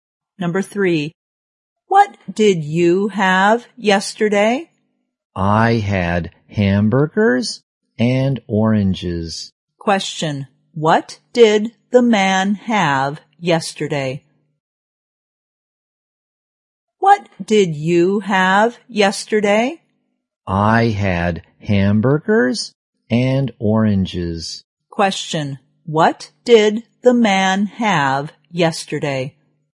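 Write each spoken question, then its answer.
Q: what did the man have yesterday?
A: Hamburgers and oranges.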